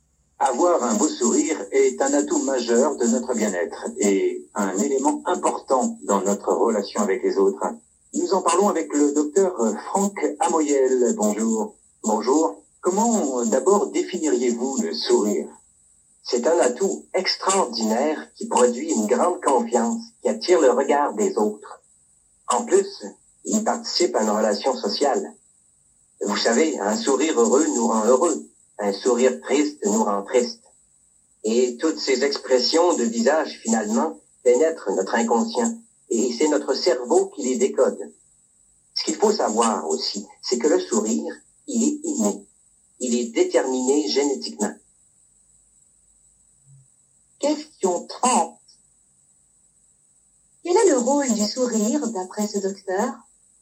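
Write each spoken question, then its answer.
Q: Quel est le rôle du sourire, d'après ce docteur?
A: Il donne confiance et participe à la relation sociale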